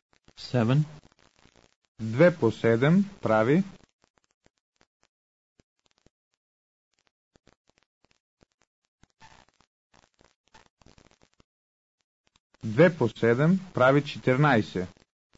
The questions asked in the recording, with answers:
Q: 2 по 7 прави.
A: 2 по 7 прави 14.